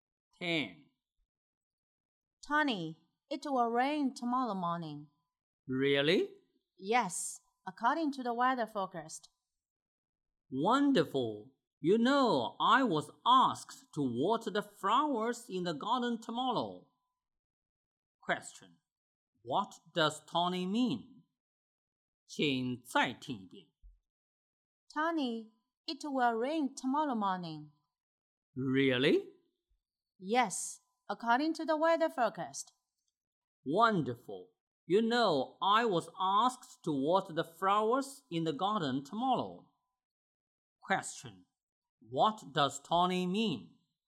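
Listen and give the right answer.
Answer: He is glad he won't have to water the flowers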